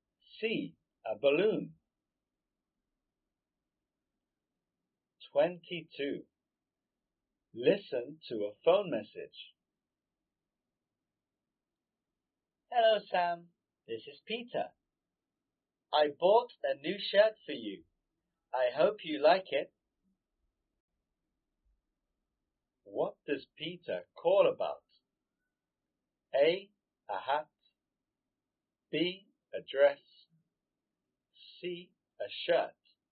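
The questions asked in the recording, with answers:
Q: What does Peter call about?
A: C: A shirt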